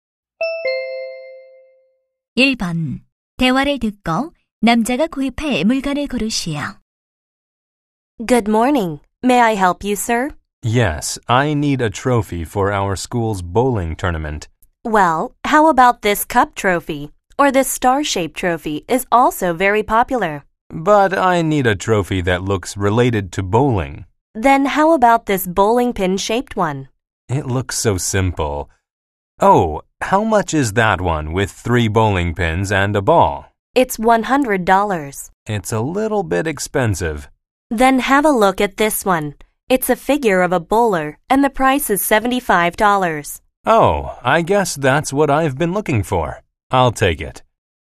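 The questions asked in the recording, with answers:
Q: 대화를 듣고 남자가 구입할 물건을 고르시오.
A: 볼링 선수 모양의 75달러짜리 트로피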